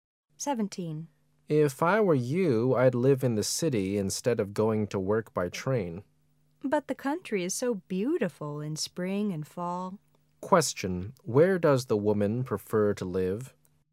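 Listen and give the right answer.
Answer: In the country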